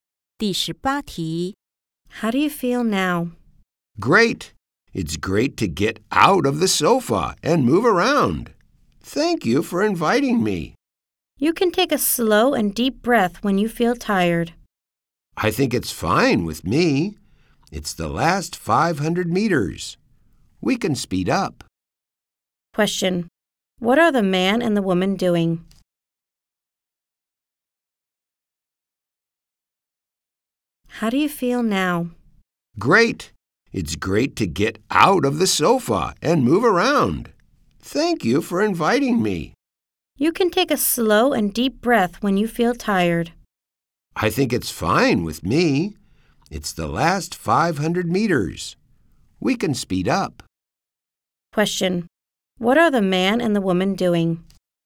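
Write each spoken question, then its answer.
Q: What are the man and the woman doing?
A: Running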